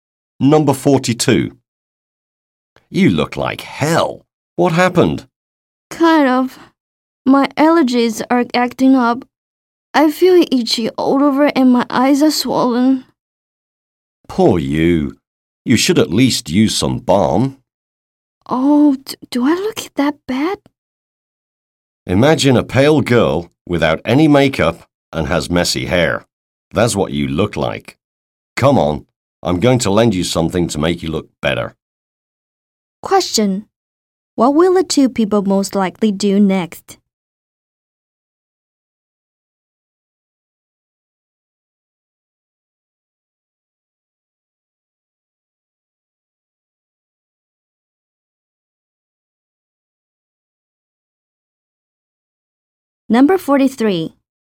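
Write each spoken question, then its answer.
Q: What will the two people most likely do next?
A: The woman will lend her friend makeup to make her look better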